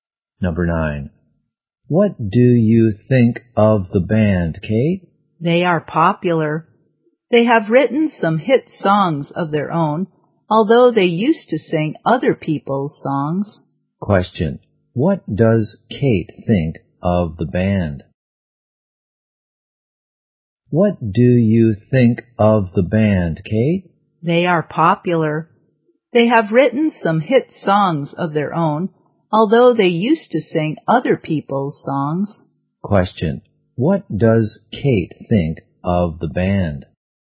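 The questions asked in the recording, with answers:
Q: What does Kate think of the band?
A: They are popular.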